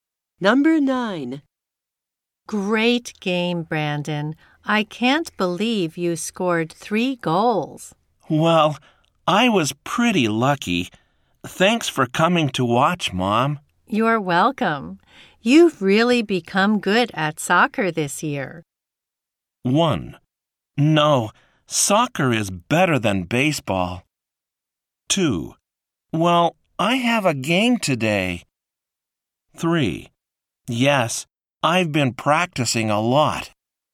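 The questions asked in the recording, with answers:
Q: You're welcome. You've really become good at soccer this year.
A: 3: Yes, I've been practicing a lot.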